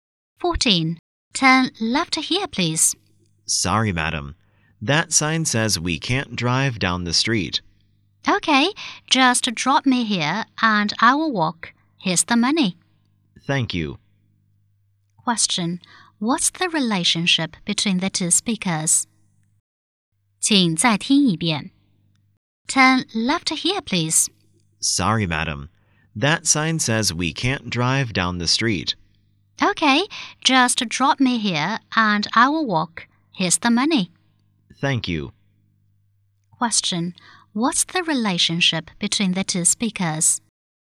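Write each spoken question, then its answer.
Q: What's the relationship between the two speakers?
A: Taxi driver and passenger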